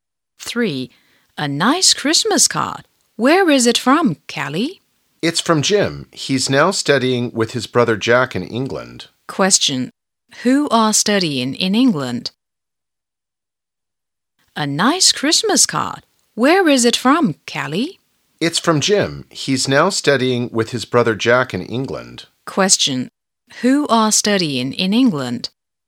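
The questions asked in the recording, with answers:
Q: Who are studying in England?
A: Jim and his brother Jack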